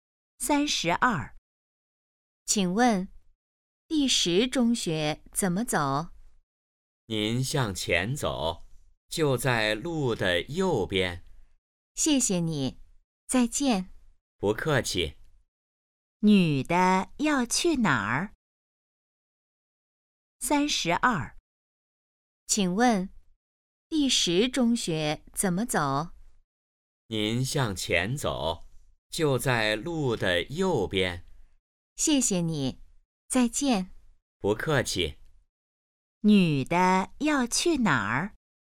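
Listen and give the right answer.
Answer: 第十中学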